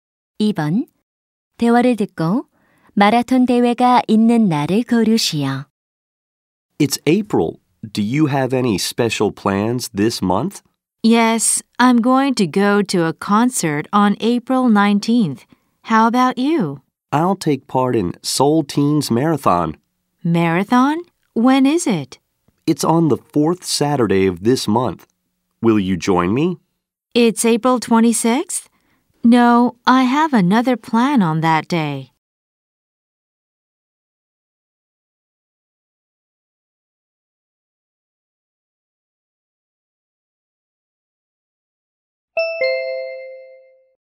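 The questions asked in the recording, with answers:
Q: 대화를 듣고 마라톤 대회가 있는 날을 고르시오.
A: 4월 26일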